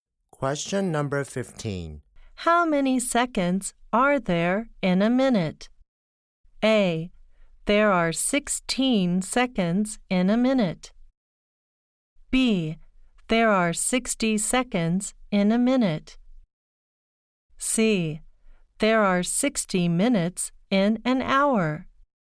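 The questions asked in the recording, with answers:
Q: How many seconds are there in a minute?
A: B: There are 60 seconds in a minute.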